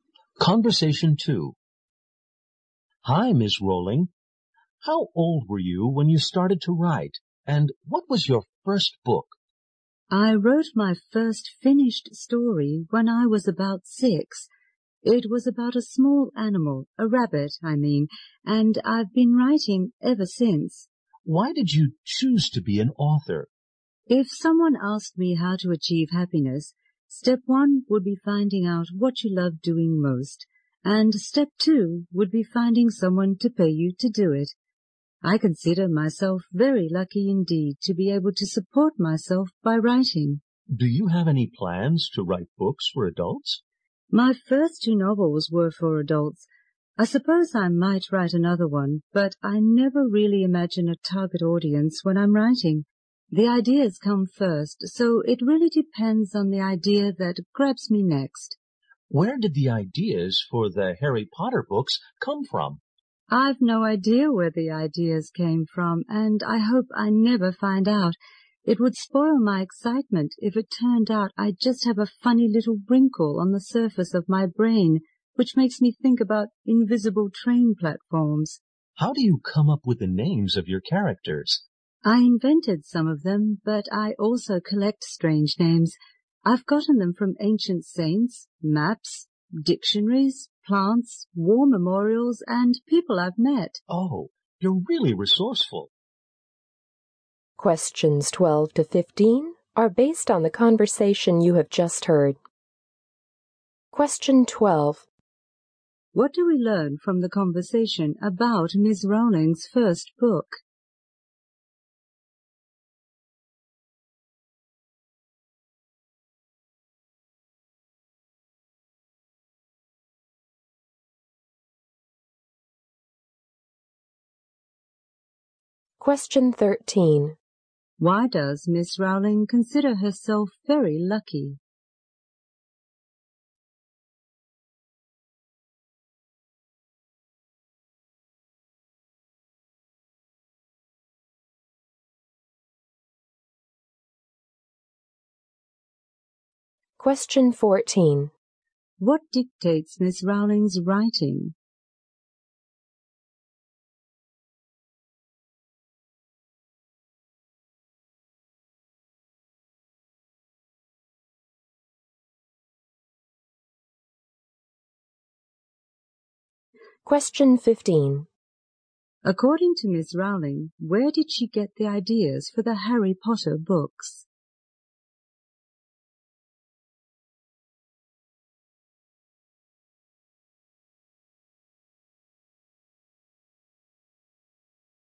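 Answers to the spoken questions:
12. It was a story about a rabbit, written when she was about 6
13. She can support herself by writing, which she loves
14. The ideas that grab her
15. She has no idea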